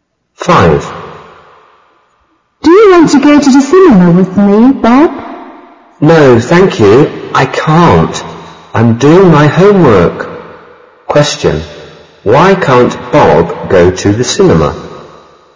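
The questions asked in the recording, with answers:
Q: Why can't Bob go to the cinema?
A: He is doing his homework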